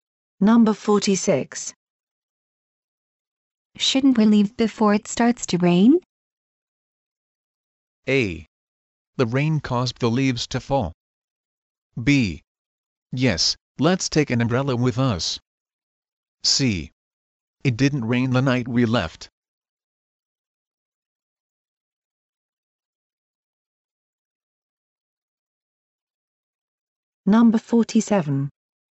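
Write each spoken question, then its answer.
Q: Shouldn't we leave before it starts to rain?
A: B: Yes, let's take an umbrella with us.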